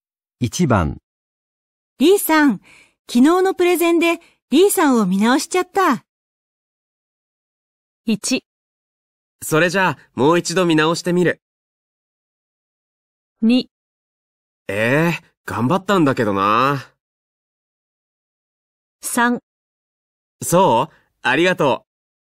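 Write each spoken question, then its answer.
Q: リーさん、昨日のプレゼンでリーさんを見直しちゃった。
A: 3: そう?ありがとう。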